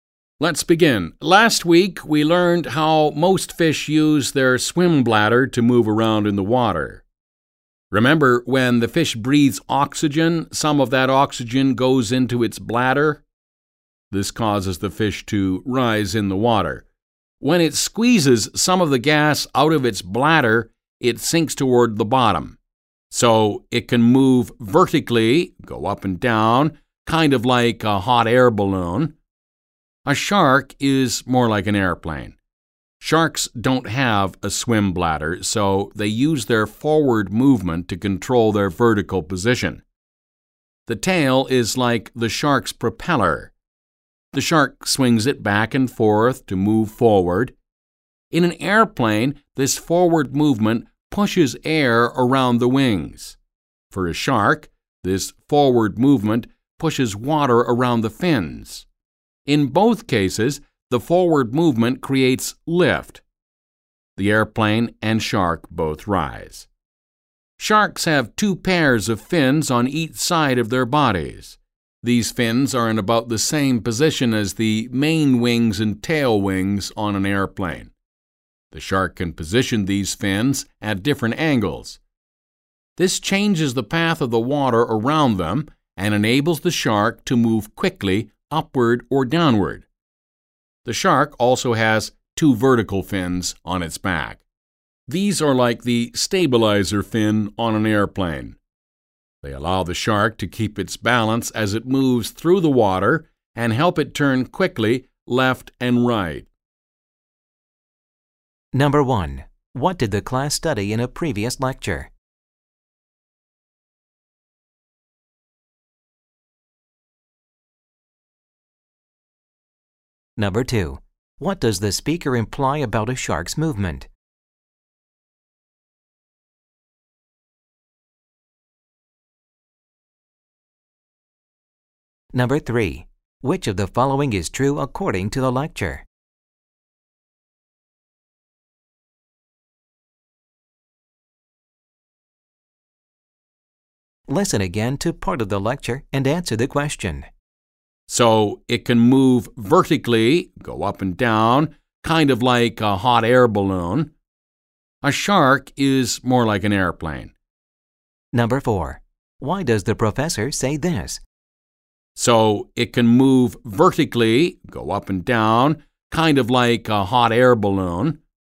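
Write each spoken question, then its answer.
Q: What did the class study in a previous lecture?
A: How most fish use their swim bladder to move up and down in the water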